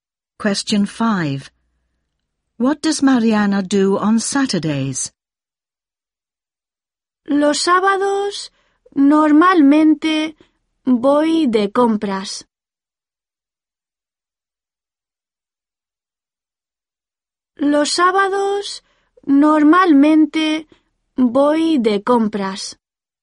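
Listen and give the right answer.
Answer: She goes shopping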